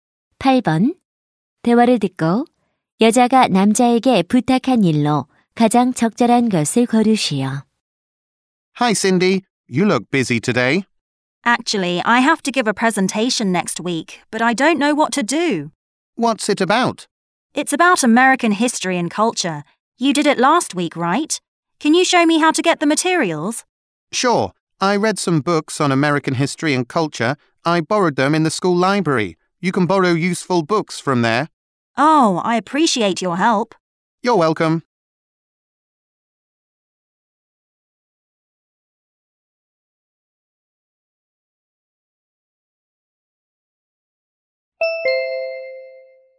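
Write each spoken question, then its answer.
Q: 대화를 듣고 여자가 남자에게 부탁한 일로 가장 적절한 것을 고르시오.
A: 발표 자료 구하는 방법 알려 주기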